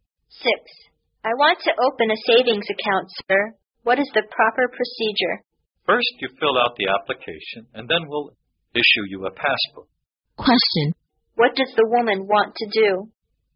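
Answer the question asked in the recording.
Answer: Open a savings account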